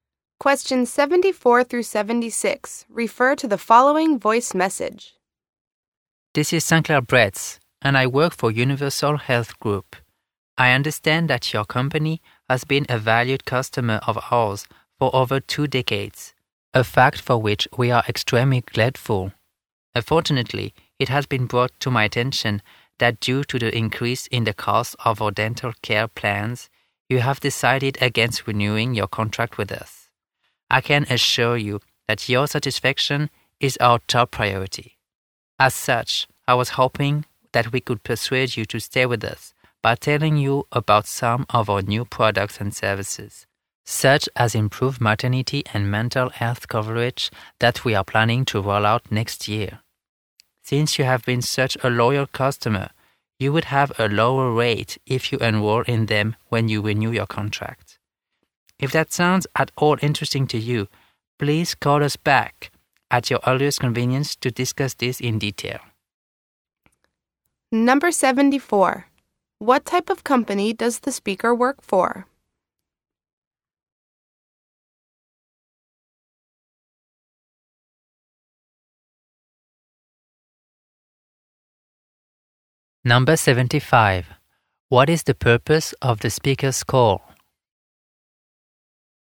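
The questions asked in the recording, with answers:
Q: What type of company does the speaker work for?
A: A health insurance company

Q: What is the purpose of the speaker's call?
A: To persuade the customer to renew its contract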